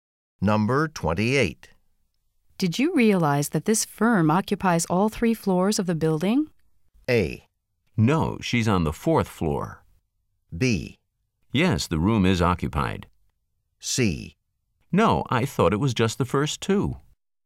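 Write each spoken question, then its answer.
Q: Did you realize that this firm occupies all three floors of the building?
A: C: No, I thought it was just the first two.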